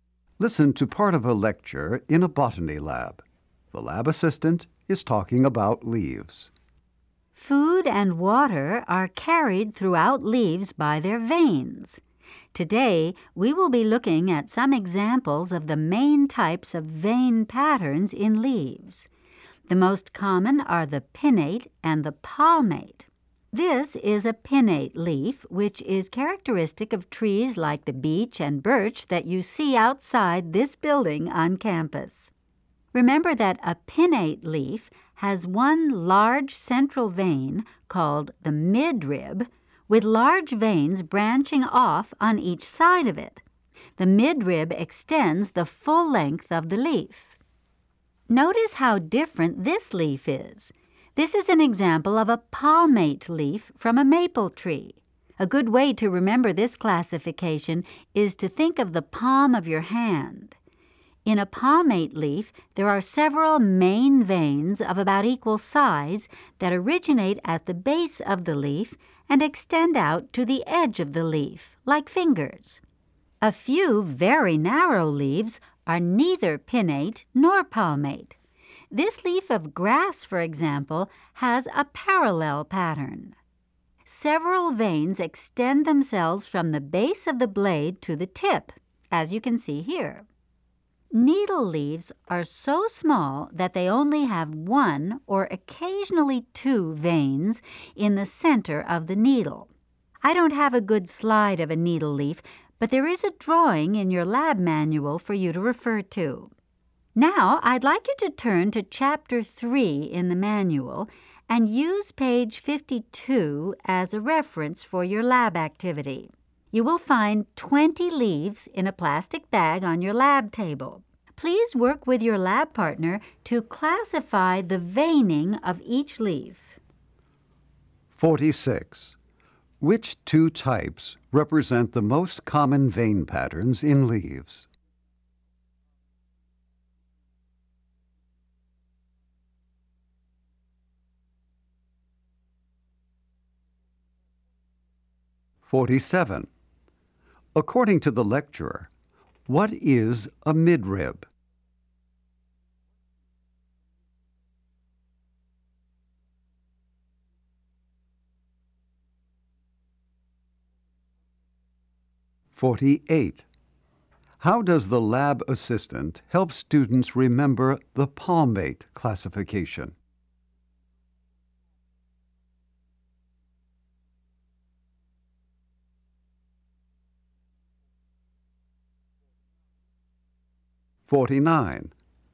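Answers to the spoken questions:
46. Pinnate and palmate
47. A large central vein that runs the full length of the leaf
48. She tells them to think of the palm of the hand, with veins like fingers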